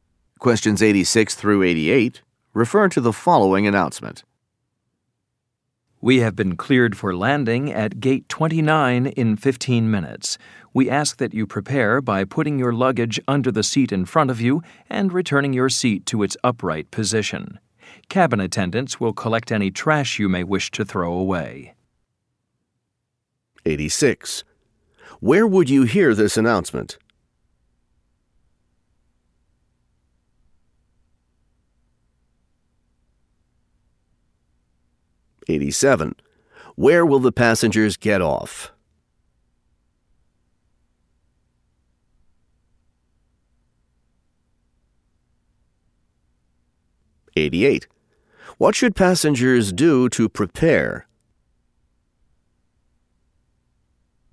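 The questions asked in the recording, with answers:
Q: Where would you hear this announcement?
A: On an airplane

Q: Where will the passengers get off?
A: Gate 29

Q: What should passengers do to prepare?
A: Put luggage under the seat and return seats upright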